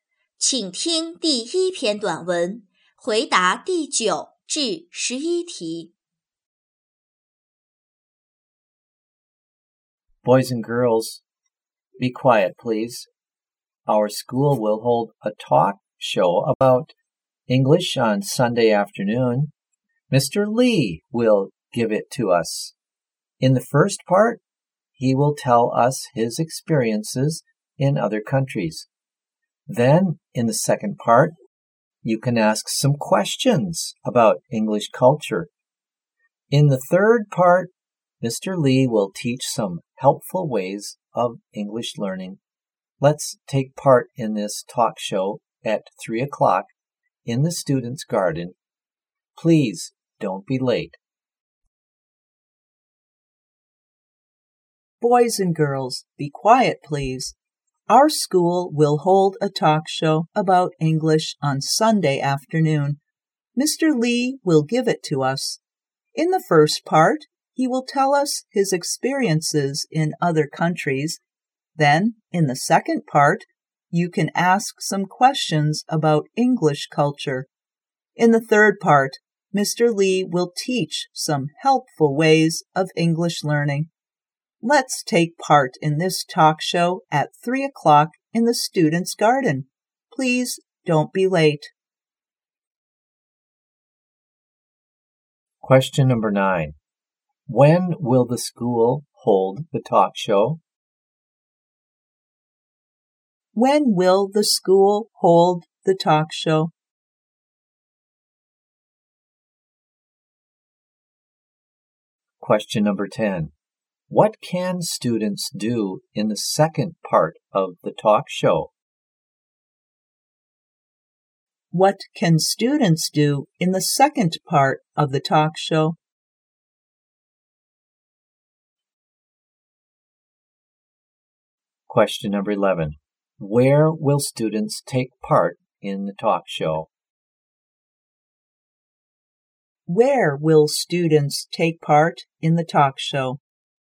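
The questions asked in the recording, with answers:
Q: When will the school hold the talk show?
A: On Sunday afternoon, at 3 o'clock.

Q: What can students do in the second part of the talk show?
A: Ask some questions about English culture.

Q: Where will students take part in the talk show?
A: In the students' garden.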